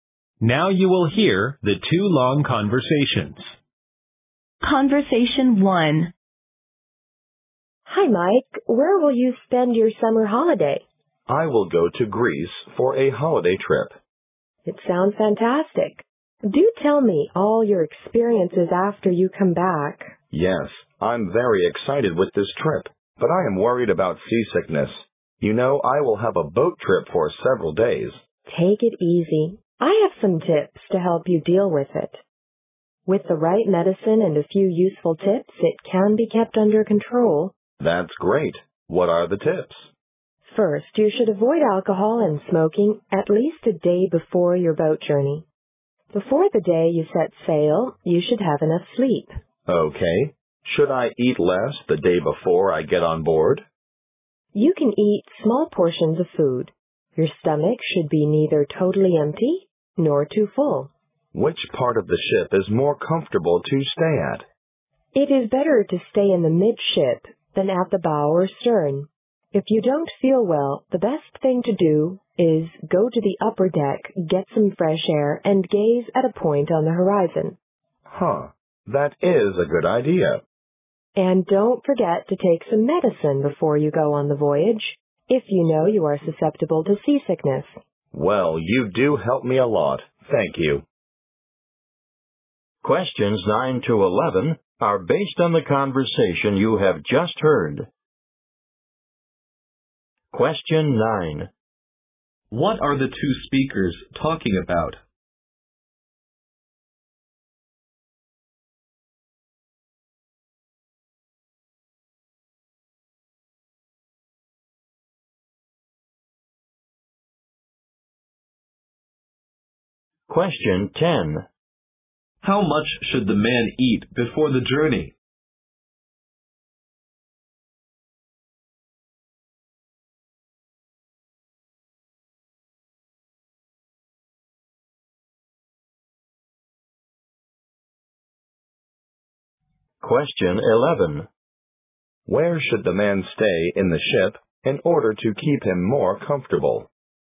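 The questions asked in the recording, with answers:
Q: What are the two speakers talking about?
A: How to deal with seasickness

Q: How much should the man eat before the journey?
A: Small portions, so his stomach is neither empty nor too full

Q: Where should the man stay in the ship in order to keep him more comfortable?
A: In the midship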